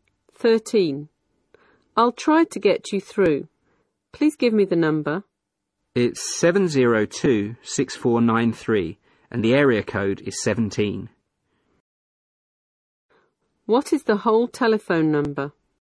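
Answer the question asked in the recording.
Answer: 17-702-6493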